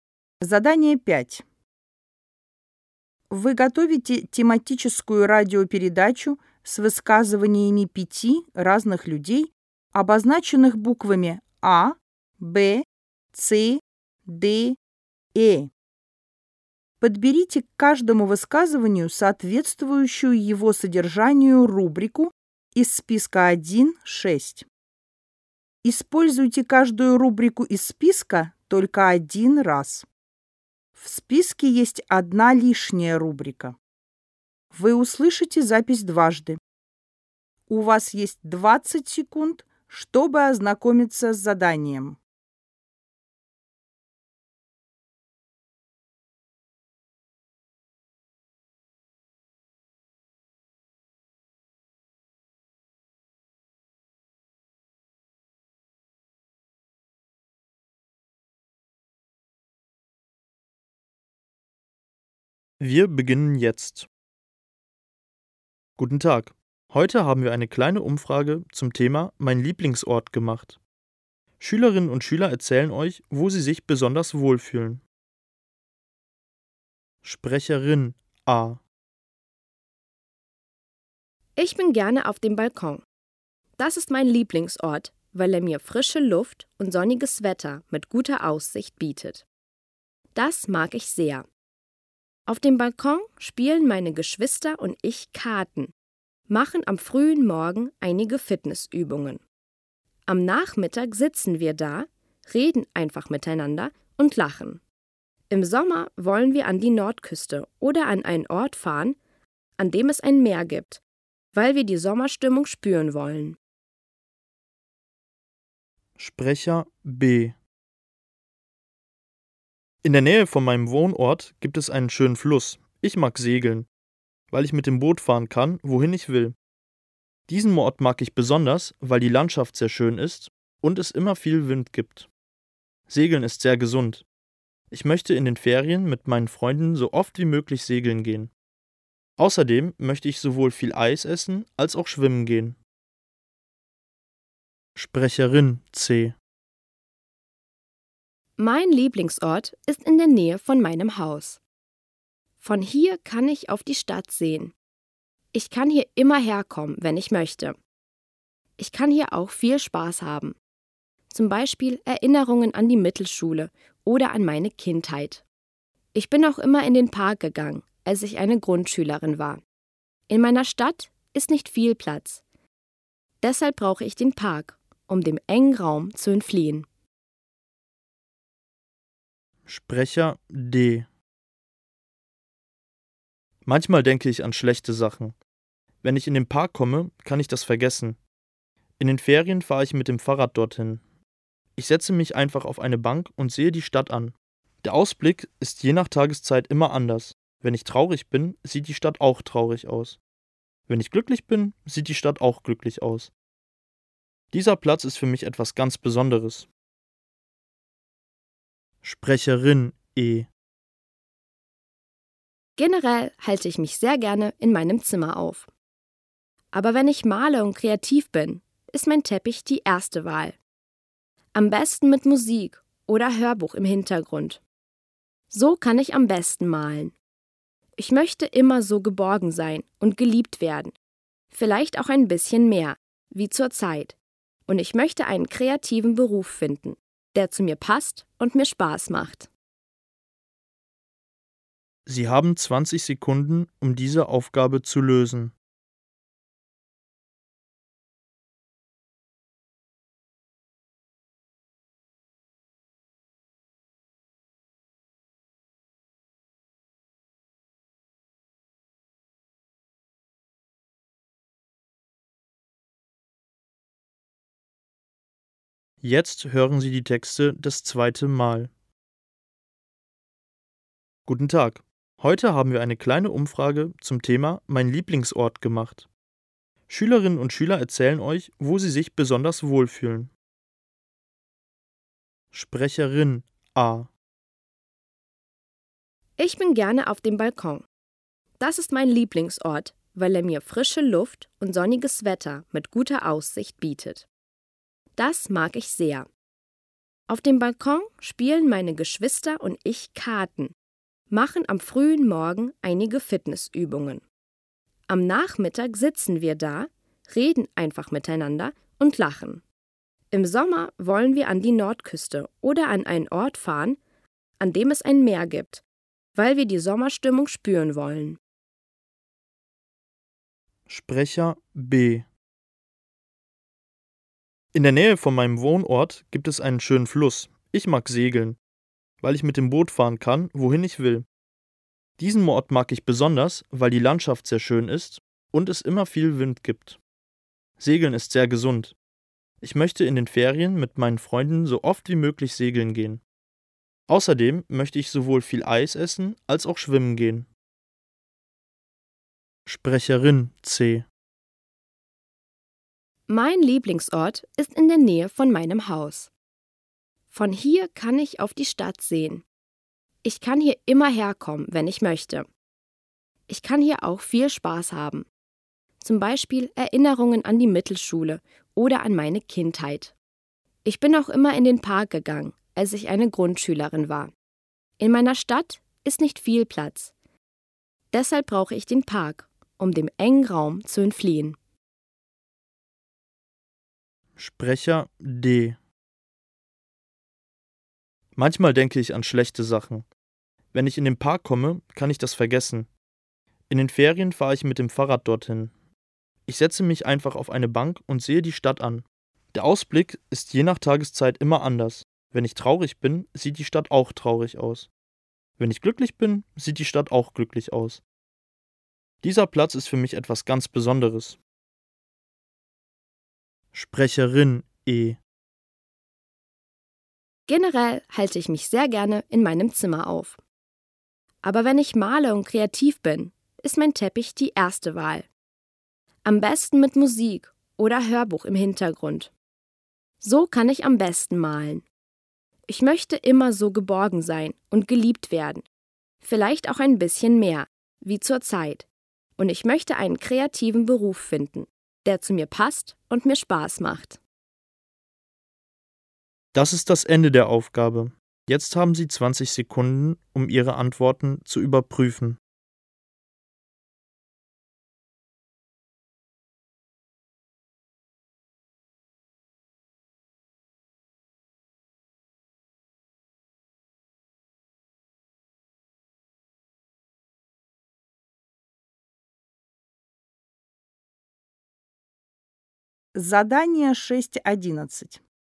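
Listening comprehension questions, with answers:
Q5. Ort, um einen Beruf auszuüben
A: keiner (überflüssig)

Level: ОГЭ 2026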